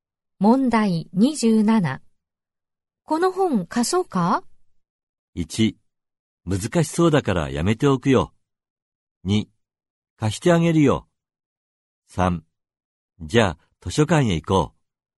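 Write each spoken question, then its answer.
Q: この本貸そうか?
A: 1: 難しそうだからやめておくよ。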